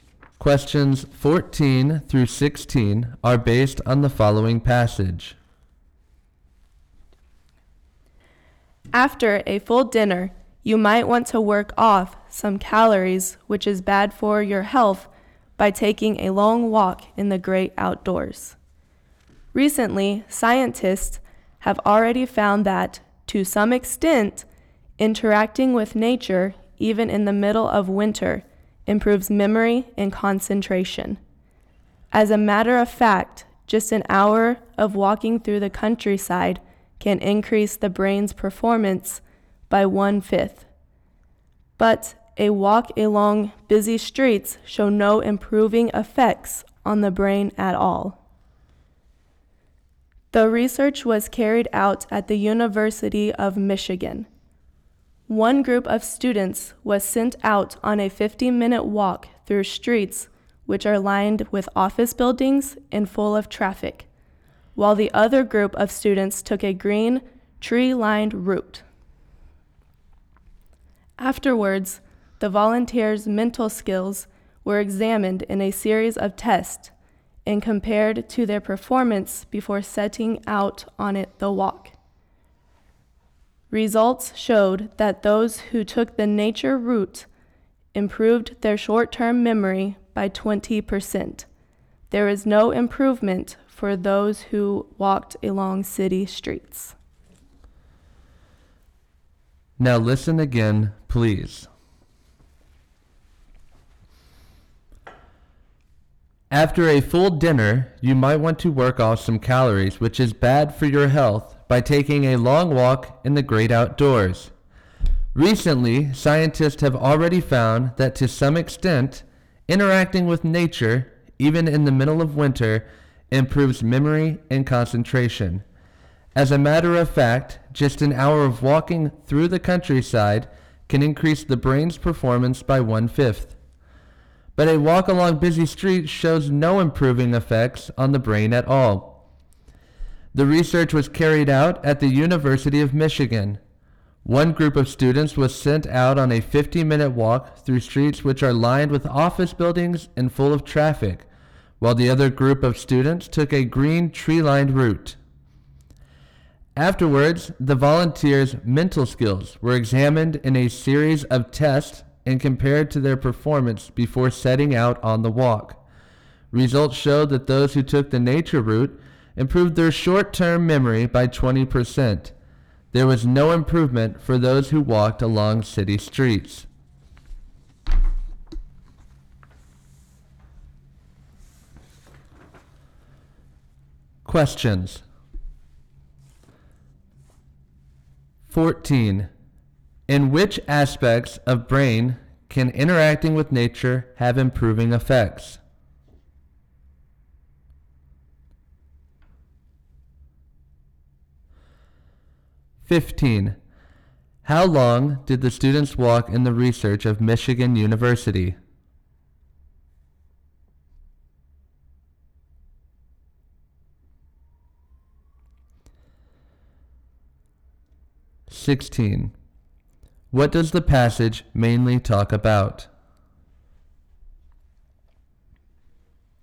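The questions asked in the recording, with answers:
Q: In which aspects of brain can interacting with nature have improving effects?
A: Memory and concentration

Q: How long did the students walk in the research of Michigan University?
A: 50 minutes

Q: What does the passage mainly talk about?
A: Walking in nature improves brain performance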